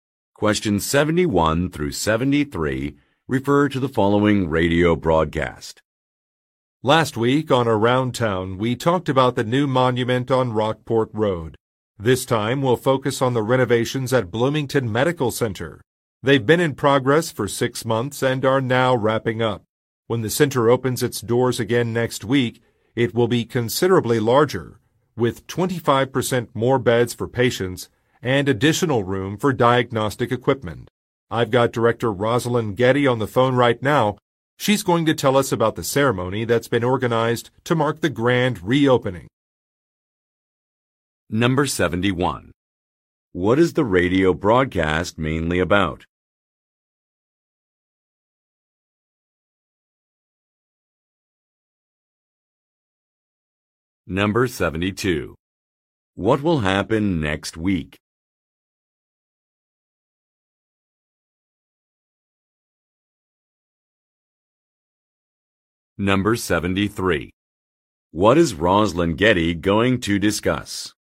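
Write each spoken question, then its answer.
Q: What is the radio broadcast mainly about?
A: The renovations at Bloomington Medical Center

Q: What will happen next week?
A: The medical center will reopen

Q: What is Rosalind Getty going to discuss?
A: The ceremony for the grand reopening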